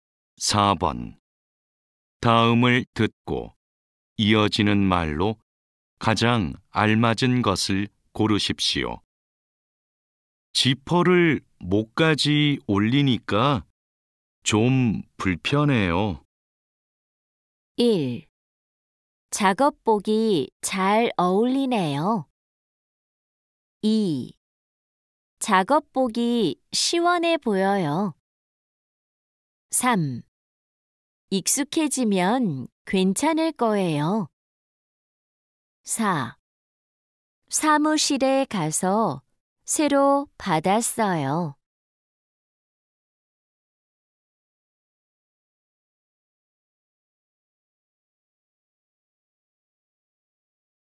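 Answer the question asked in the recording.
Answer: 3: 익숙해지면 괜찮을 거예요.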